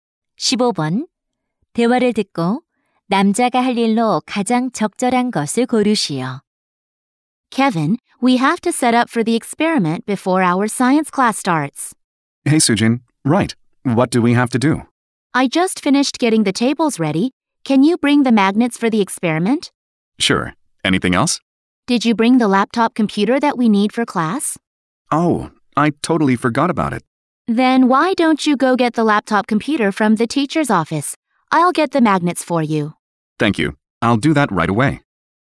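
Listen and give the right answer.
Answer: 교무실에서 노트북 컴퓨터 가져오기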